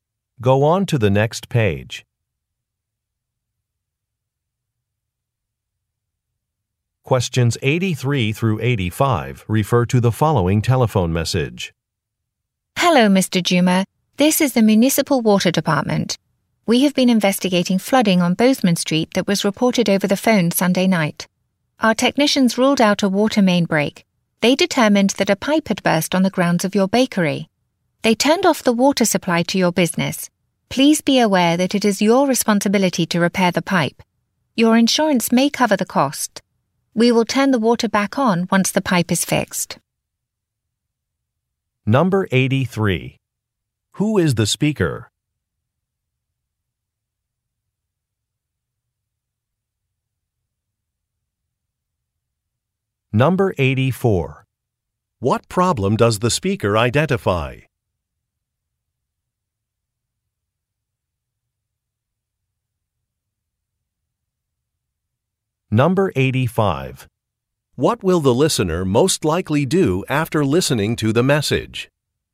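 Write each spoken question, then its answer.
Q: Who is the speaker?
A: A water department employee

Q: What problem does the speaker identify?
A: A burst pipe at the bakery

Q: What will the listener most likely do after listening to the message?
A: Get the pipe repaired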